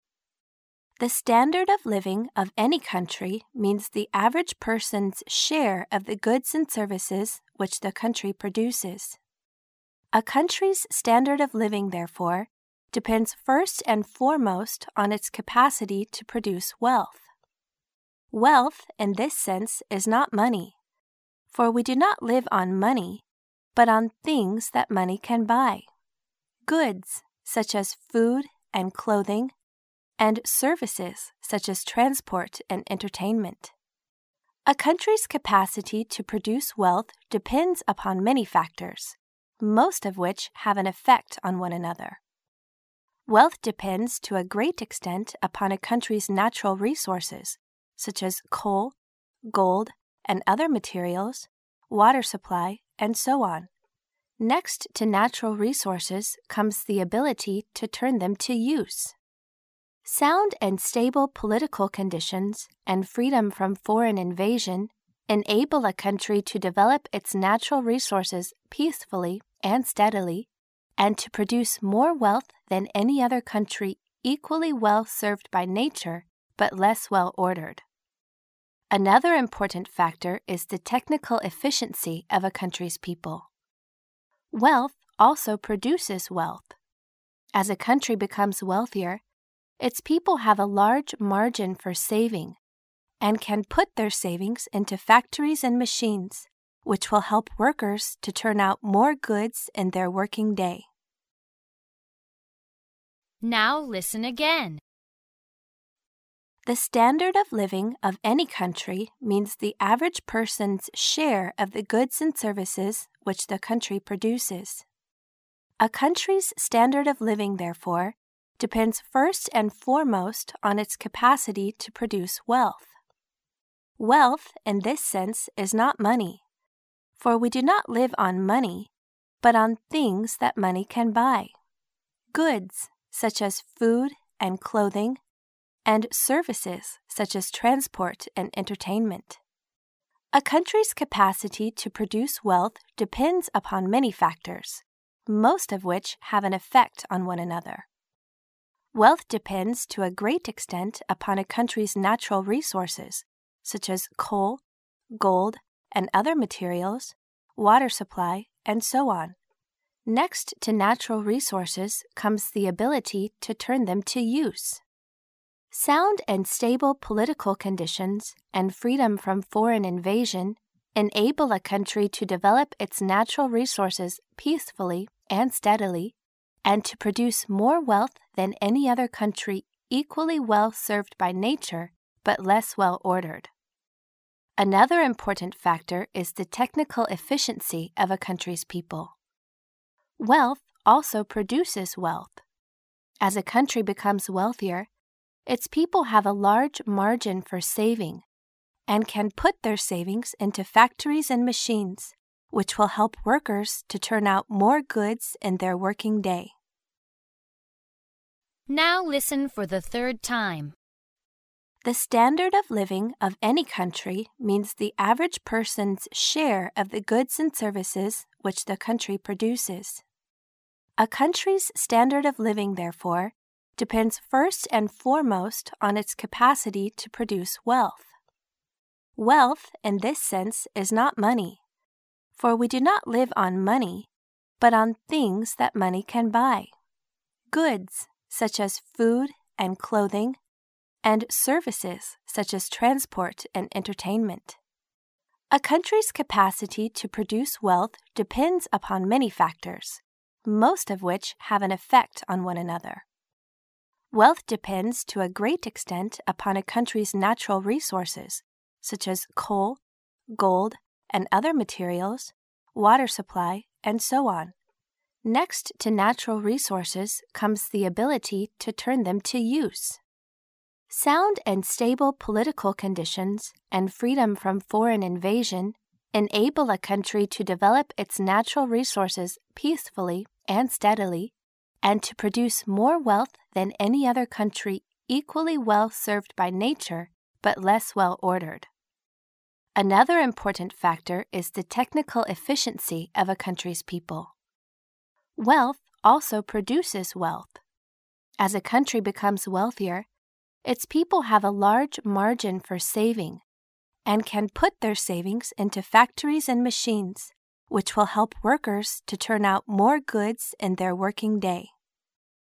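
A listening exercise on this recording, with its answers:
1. The "standard of living" of any country means the average person's 1 of the goods and services which the country produces.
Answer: share

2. A country's standard of living, therefore, depends first and 2 on its capacity to produce wealth.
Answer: foremost

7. A country's capacity to produce wealth depends upon many 7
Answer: factors

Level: 大学英语六级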